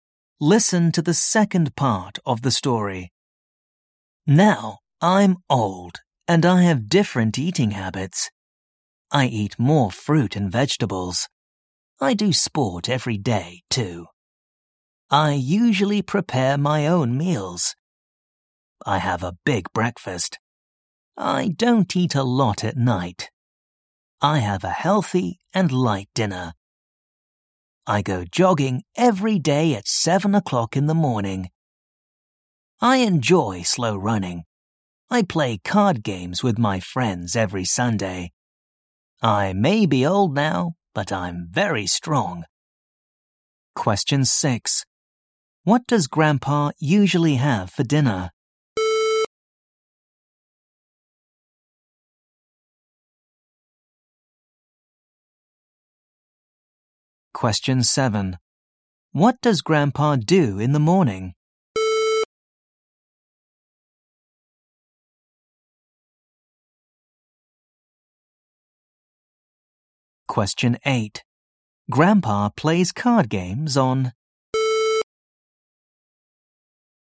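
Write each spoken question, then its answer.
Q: What does Grandpa usually have for dinner?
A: A healthy and light dinner

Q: What does Grandpa do in the morning?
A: He goes jogging at 7 o'clock

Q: Grandpa plays card games on.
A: Sunday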